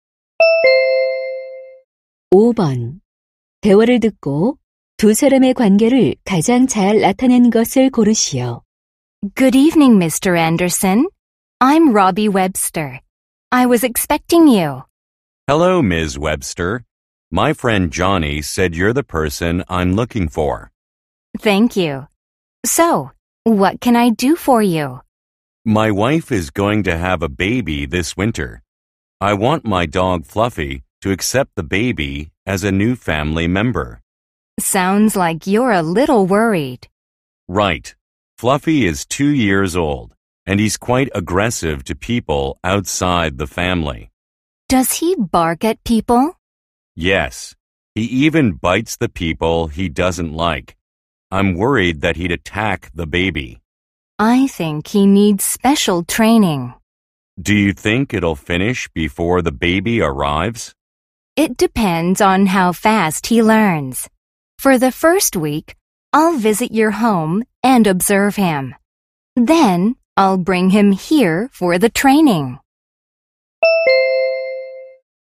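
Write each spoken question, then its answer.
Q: 대화를 듣고 두 사람의 관계를 가장 잘 나타낸 것을 고르시오.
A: 반려견 훈련사 - 개 주인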